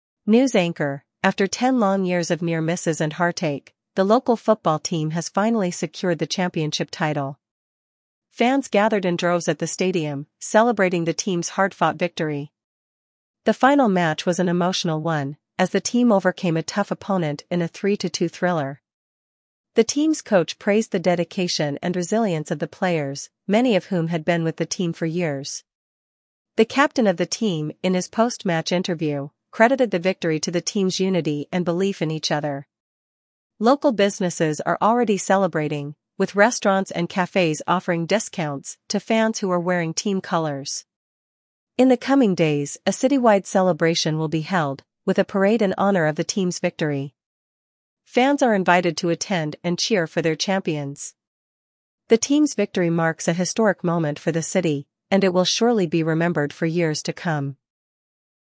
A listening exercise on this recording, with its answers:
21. How long did the team wait for their championship win?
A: Ten years.

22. What was the score of the final match?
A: 3-2.

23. Who praised the players for their dedication?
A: The coach.

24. What did the team's captain attribute the victory to?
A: Team unity and belief.

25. How are local businesses celebrating the win?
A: Offering discounts for fans wearing team colors.

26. What city-wide event is planned in honor of the team's victory?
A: A parade.

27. What is the significance of this win for the city?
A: It marks a historic moment for the city.

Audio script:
News Anchor: After ten long years of near misses and heartache, the local football team has finally secured the championship title. Fans gathered in droves at the stadium, celebrating the team's hard-fought victory. The final match was an emotional one, as the team overcame a tough opponent in a 3-2 thriller.
The team's coach praised the dedication and resilience of the players, many of whom had been with the team for years. The captain of the team, in his post-match interview, credited the victory to the team's unity and belief in each other. Local businesses are already celebrating, with restaurants and cafes offering discounts to fans who are wearing team colors.
In the coming days, a city-wide celebration will be held, with a parade in honor of the team's victory. Fans are invited to attend and cheer for their champions. The team's victory marks a historic moment for the city, and it will surely be remembered for years to come.